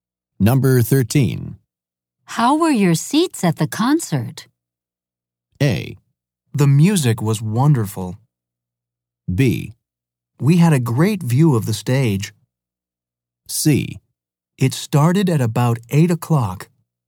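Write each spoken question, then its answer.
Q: How were your seats at the concert?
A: B: We had a great view of the stage.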